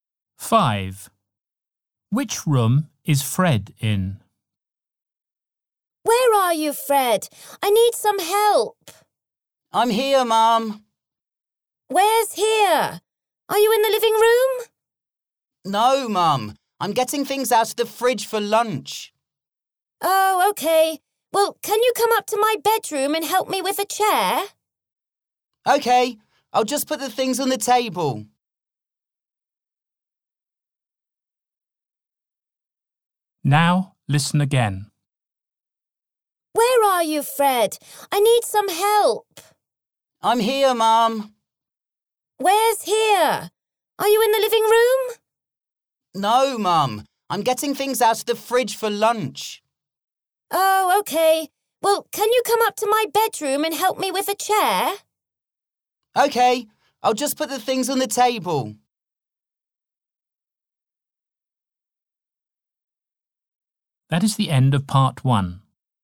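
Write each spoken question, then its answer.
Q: Which room is Fred in?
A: the kitchen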